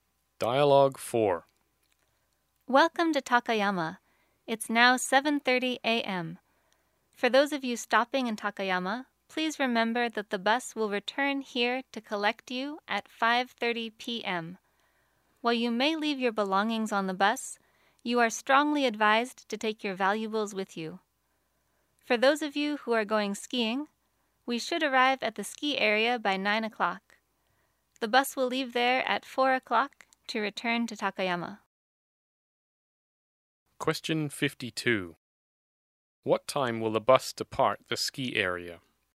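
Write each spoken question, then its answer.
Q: What time will the bus depart the ski area?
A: 4 o'clock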